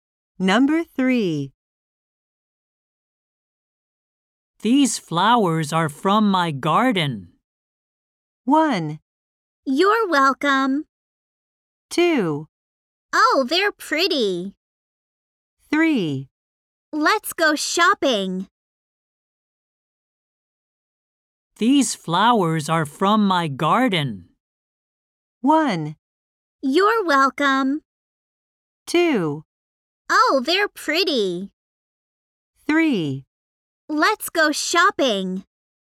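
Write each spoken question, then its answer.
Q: These flowers are from my garden.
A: 2: Oh, they're pretty.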